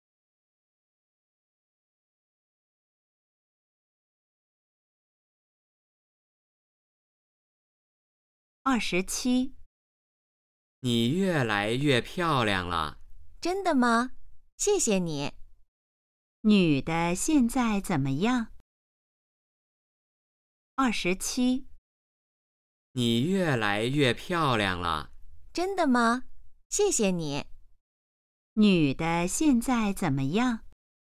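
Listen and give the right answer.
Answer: 越来越漂亮了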